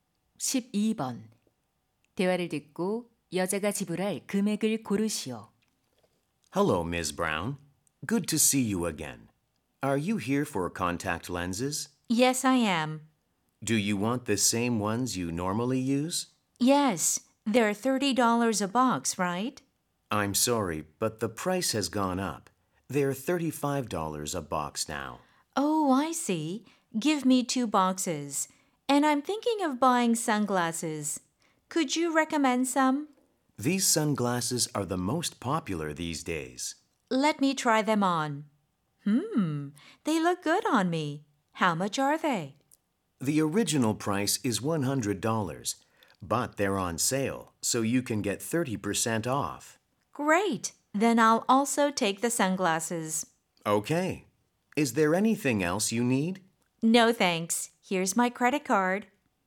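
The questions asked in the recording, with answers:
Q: 대화를 듣고 여자가 지불할 금액을 고르시오.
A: $140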